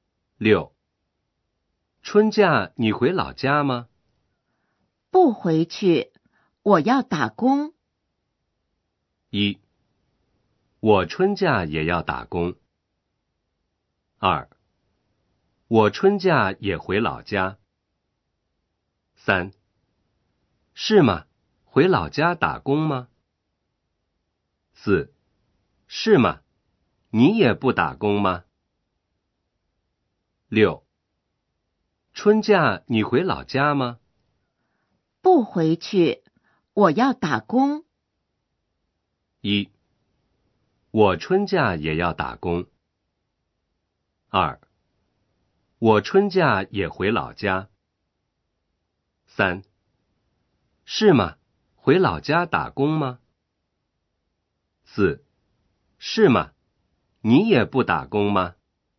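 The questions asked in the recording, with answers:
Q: 春假你回老家吗?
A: 1: 我春假也要打工。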